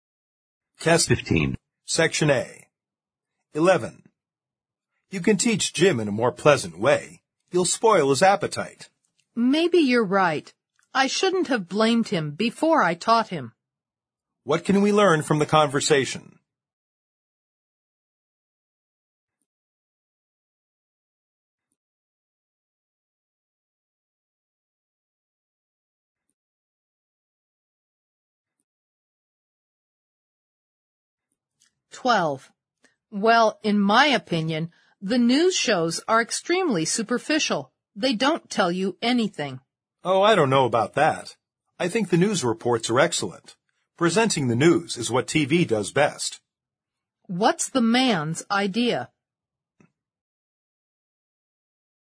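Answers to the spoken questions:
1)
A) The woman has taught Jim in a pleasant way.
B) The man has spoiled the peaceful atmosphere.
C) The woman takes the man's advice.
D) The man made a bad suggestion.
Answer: C) The woman takes the man's advice.
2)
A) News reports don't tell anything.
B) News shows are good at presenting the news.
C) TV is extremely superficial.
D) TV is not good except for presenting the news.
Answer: B) News shows are good at presenting the news.

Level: 四级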